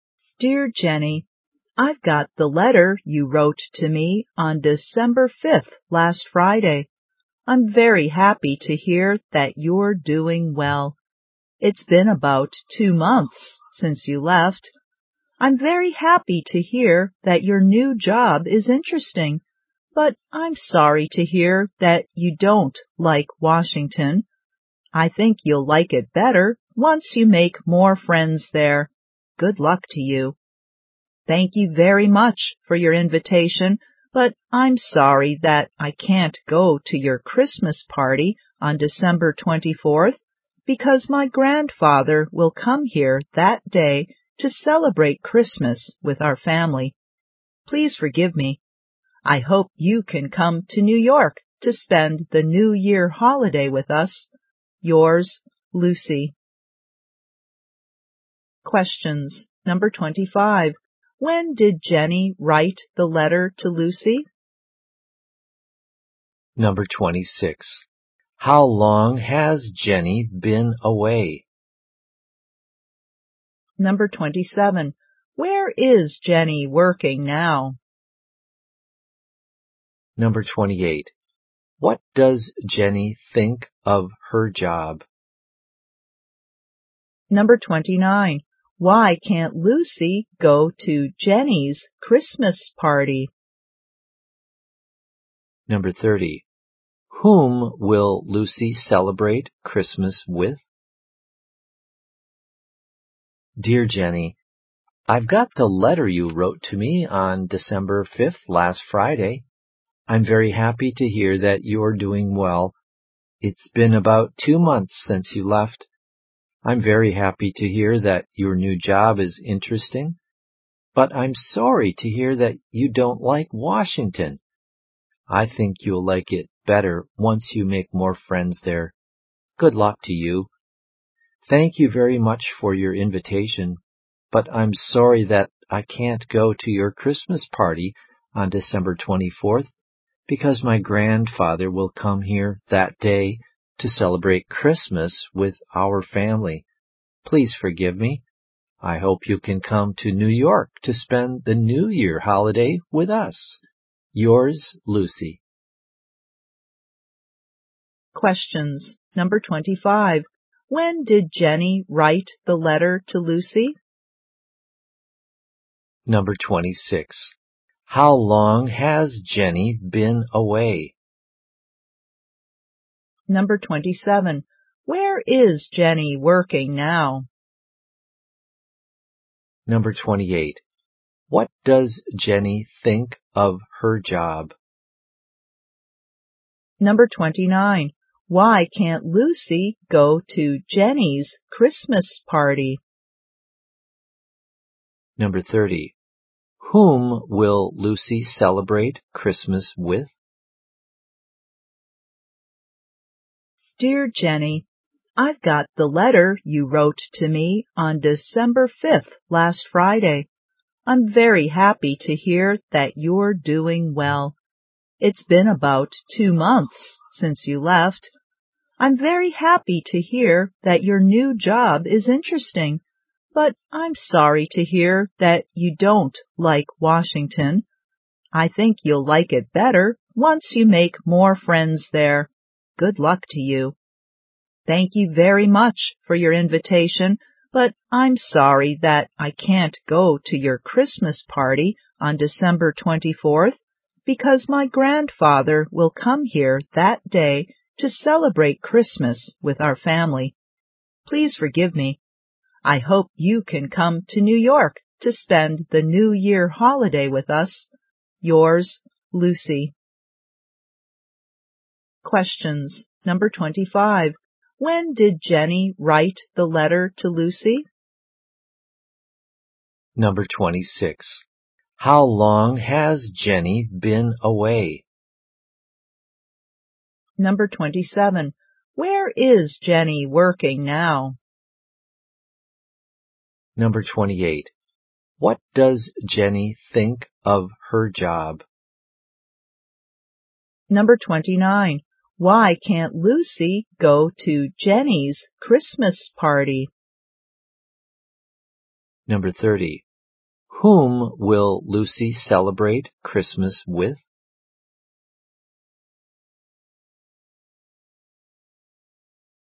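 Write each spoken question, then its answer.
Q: When did Jenny write the letter to Lucy?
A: On December 5th

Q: How long has Jenny been away?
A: About 2 months

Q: Where is Jenny working now?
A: In Washington

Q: What does Jenny think of her job?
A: Interesting

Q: Why can't Lucy go to Jenny's Christmas party?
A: Her grandfather will come to celebrate Christmas with her family that day

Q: Whom will Lucy celebrate Christmas with?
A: Her family and her grandfather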